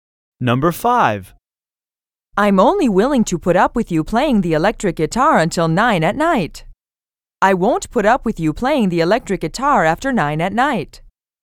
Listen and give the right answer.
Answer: Same as the correct answer.